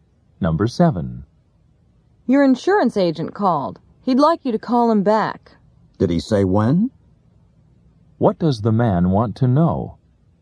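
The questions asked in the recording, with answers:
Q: What does the man want to know?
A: When he should call the insurance agent back.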